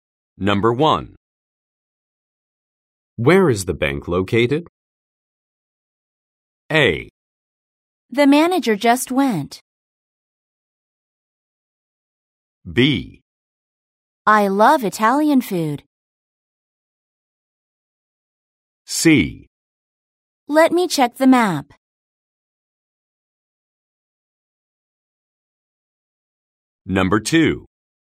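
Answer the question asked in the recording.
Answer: C: Let me check the map.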